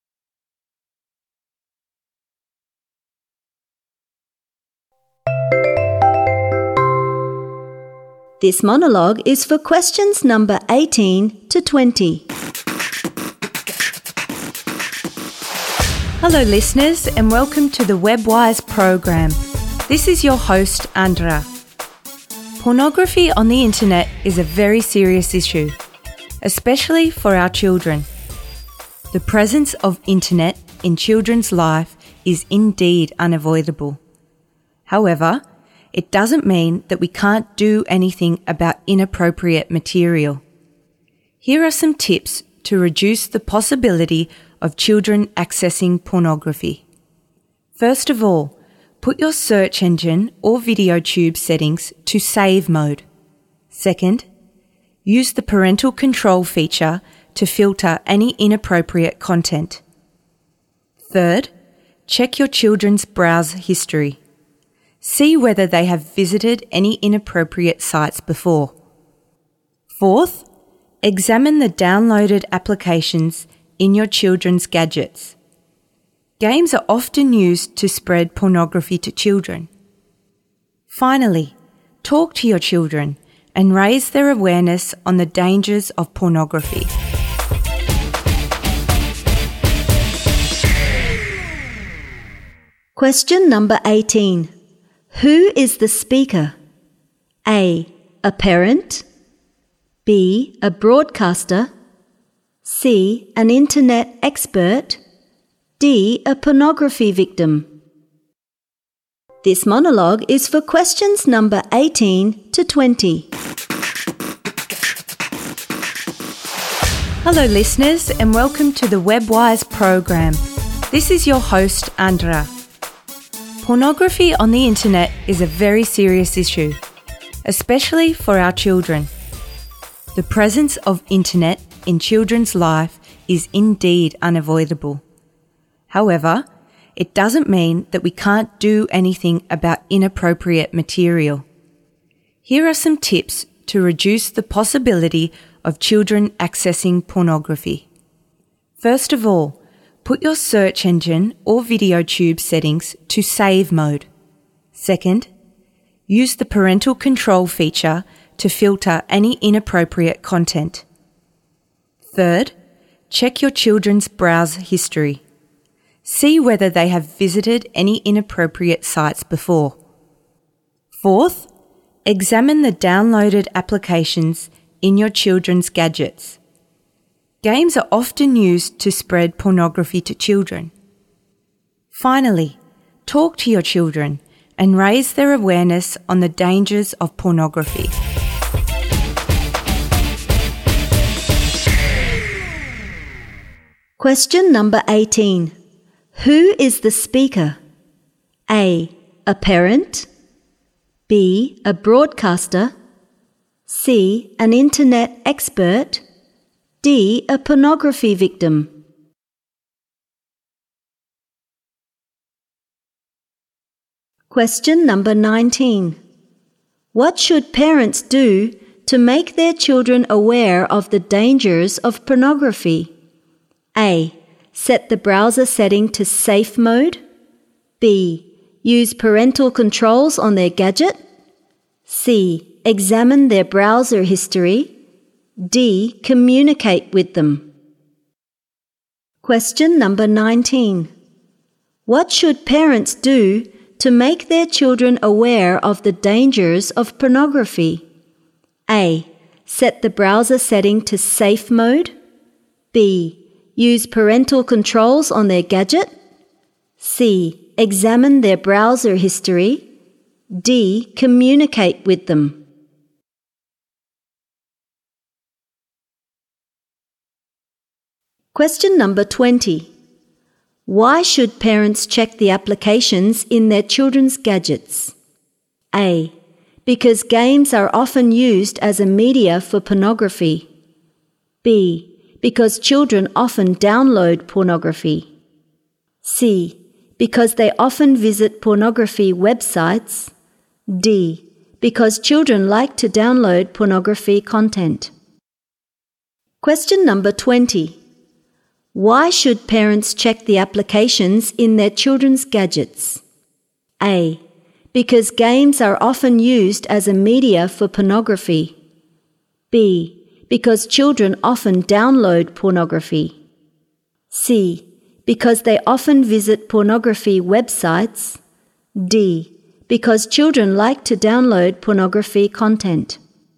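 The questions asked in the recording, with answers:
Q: Who is the speaker?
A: B: A broadcaster.

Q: What should parents do to make their children aware of the dangers of pornography?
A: D: Communicate with them.

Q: Why should parents check the applications in their children's gadgets?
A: A: Because games are often used as a media for pornography.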